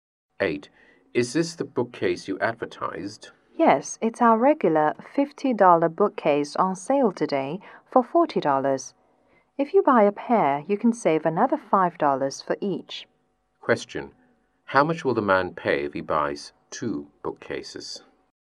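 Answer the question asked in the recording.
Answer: $70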